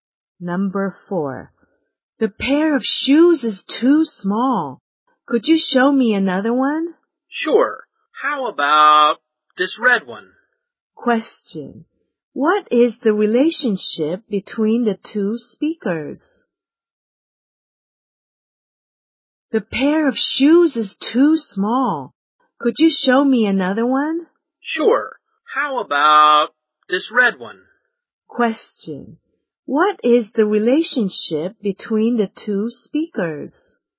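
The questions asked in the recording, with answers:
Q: What is the relationship between the two speakers?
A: Customer and shop assistant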